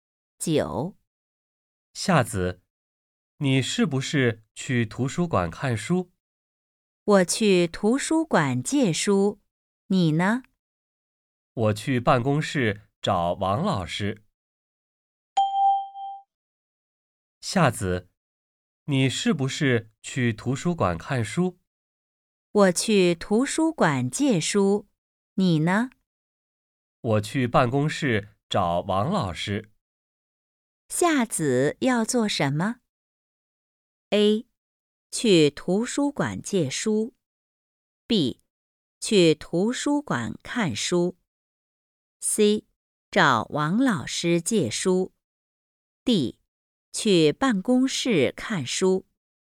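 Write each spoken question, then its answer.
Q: 夏子要做什么?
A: A: 去图书馆借书。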